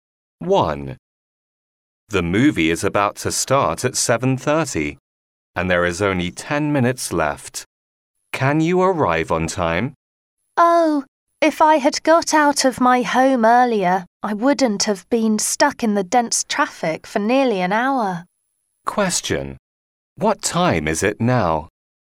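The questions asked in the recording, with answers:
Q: What time is it now?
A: 7:20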